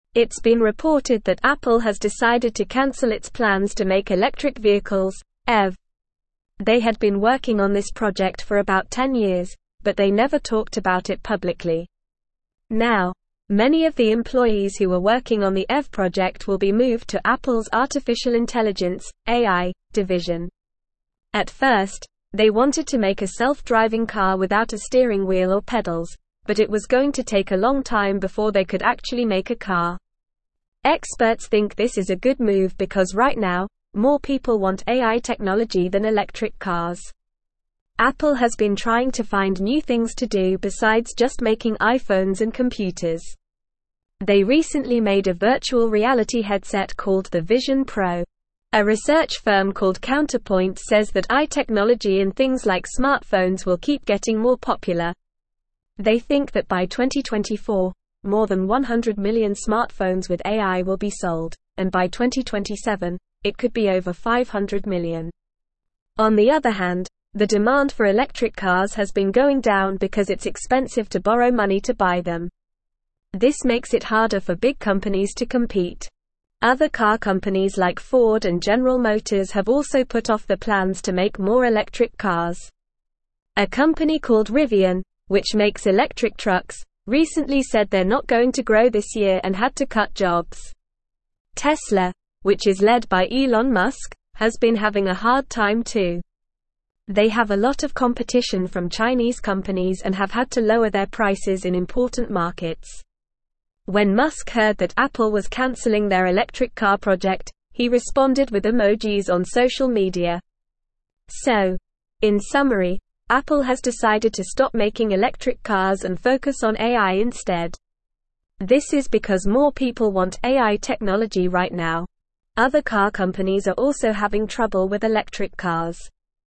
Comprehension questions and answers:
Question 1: It's been reported that Apple has decided to cancel its plans to make (1)______ vehicles (EV).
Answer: electric

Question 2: They had been (2)______ on this project for about 10 (3)______, but they never talked about it publicly.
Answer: working

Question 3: They had been (2)______ on this project for about 10 (3)______, but they never talked about it publicly.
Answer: years

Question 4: Now, many of the employees who were working on the EV project will be moved to Apple's artificial intelligence (AI) (4)______.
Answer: division

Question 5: (5)______ think this is a good move because right now, more people want AI technology than electric cars.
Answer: Experts

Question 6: Apple has been trying to find new things to do besides just making iPhones and (6)______.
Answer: computers

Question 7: They recently made a virtual reality (7)______ called the Vision Pro.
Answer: headset

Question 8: A research firm called (8)______ says that AI technology in things like smartphones will keep getting more popular.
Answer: Counterpoint

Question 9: On the other hand, the demand for electric cars has been (9)______ down because it's expensive to (10)______ money to buy them.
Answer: going

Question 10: On the other hand, the demand for electric cars has been (9)______ down because it's expensive to (10)______ money to buy them.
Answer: borrow

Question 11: Other car companies like Ford and General Motors have also put off their (11)______ to make more electric cars.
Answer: plans

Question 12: A (12)______ called Rivian, which makes electric trucks, recently said they're not going to grow this year and had to cut jobs.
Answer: company

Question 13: They have a lot of competition from (13)______ companies and have had to (14)______ their prices in important markets.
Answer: Chinese

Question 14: They have a lot of competition from (13)______ companies and have had to (14)______ their prices in important markets.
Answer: lower

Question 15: So, in summary, Apple has decided to stop (15)______ electric cars and focus on AI instead.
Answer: making

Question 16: Other car companies are also having (16)______ with electric cars.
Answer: trouble

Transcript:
It's been reported that Apple has decided to cancel its plans to make electric vehicles (EV). They had been working on this project for about 10 years, but they never talked about it publicly. Now, many of the employees who were working on the EV project will be moved to Apple's artificial intelligence (AI) division. At first, they wanted to make a self-driving car without a steering wheel or pedals, but it was going to take a long time before they could actually make a car. Experts think this is a good move because right now, more people want AI technology than electric cars.
Apple has been trying to find new things to do besides just making iPhones and computers. They recently made a virtual reality headset called the Vision Pro. A research firm called Counterpoint says that AI technology in things like smartphones will keep getting more popular. They think that by 2024, more than 100 million smartphones with AI will be sold, and by 2027, it could be over 500 million. On the other hand, the demand for electric cars has been going down because it's expensive to borrow money to buy them. This makes it harder for big companies to compete.
Other car companies like Ford and General Motors have also put off their plans to make more electric cars. A company called Rivian, which makes electric trucks, recently said they're not going to grow this year and had to cut jobs. Tesla, which is led by Elon Musk, has been having a hard time too. They have a lot of competition from Chinese companies and have had to lower their prices in important markets. When Musk heard that Apple was canceling their electric car project, he responded with emojis on social media.
So, in summary, Apple has decided to stop making electric cars and focus on AI instead. This is because more people want AI technology right now. Other car companies are also having trouble with electric cars.

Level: Level 3